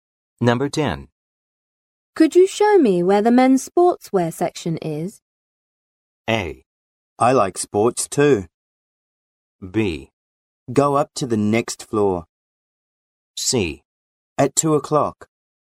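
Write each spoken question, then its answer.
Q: Could you show me where the men's sportswear section is?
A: B: Go up to the next floor.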